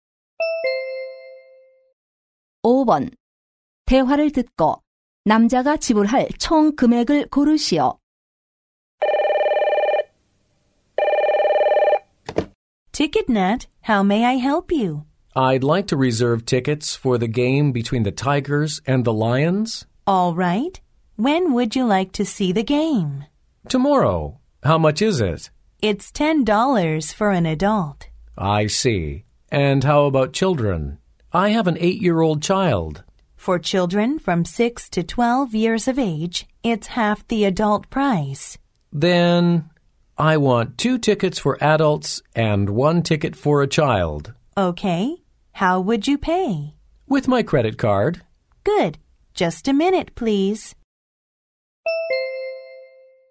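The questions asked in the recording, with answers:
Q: 대화를 듣고 남자가 지불할 총 금액을 고르시오.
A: 25달러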